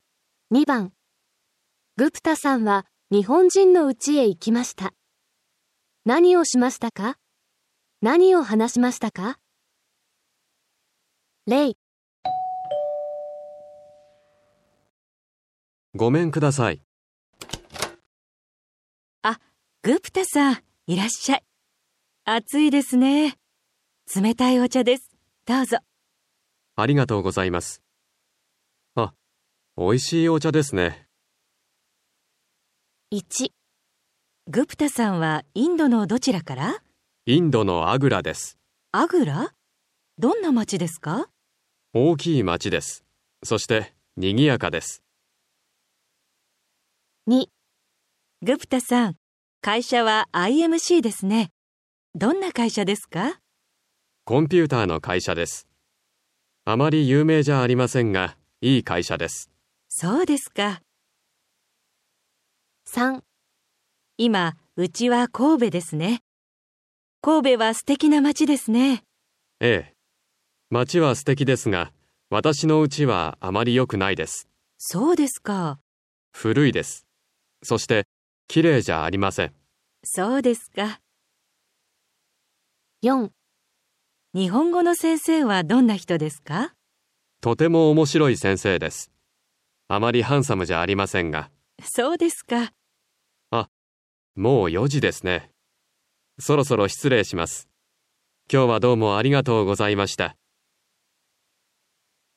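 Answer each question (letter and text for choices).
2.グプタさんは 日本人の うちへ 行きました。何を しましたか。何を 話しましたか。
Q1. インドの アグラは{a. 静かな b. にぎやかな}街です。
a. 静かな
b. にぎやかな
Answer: b. にぎやかな

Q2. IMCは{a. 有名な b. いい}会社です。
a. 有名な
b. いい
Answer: b. いい

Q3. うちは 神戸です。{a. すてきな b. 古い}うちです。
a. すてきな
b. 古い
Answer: b. 古い

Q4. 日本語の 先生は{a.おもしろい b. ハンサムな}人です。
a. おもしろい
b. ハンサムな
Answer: a. おもしろい

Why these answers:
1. B: 大きい 町です、そしてにぎやかな 町です。
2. あまり 有名じゃありませんが、 いい会社です。
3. B: 古いです。そして きれいじゃ ありません。
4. B: とても 面白い先生です。あまり ハンサムじゃありませんが。

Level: N5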